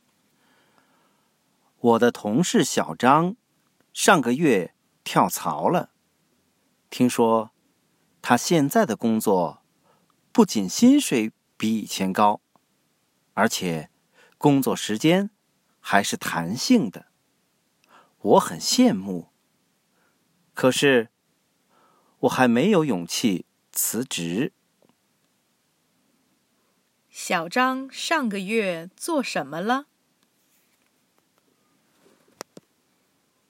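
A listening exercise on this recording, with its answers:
What did Xiao Zhang do last month?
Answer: Changed job

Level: Advanced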